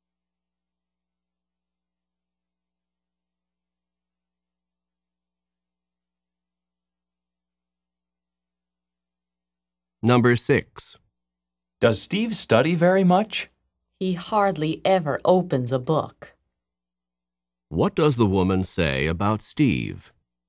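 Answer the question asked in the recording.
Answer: He almost never studies.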